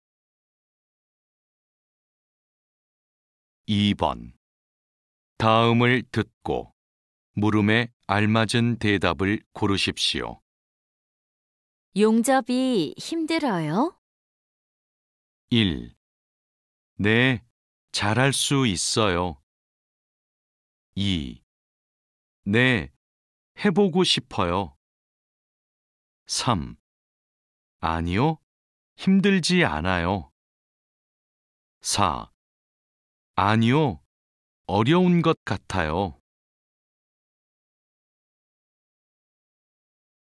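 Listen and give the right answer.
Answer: 3: 아니요, 힘들지 않아요.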